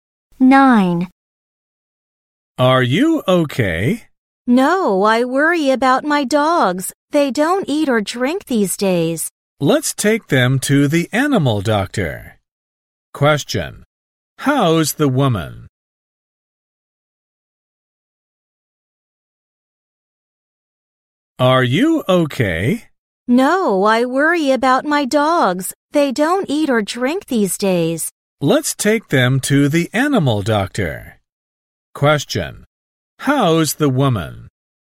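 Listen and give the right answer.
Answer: She is worried about her dogs.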